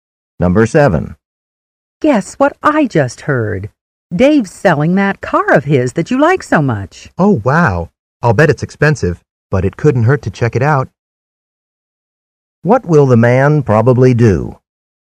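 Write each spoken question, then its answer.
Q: What will the man probably do?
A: Go and find out about Dave's car.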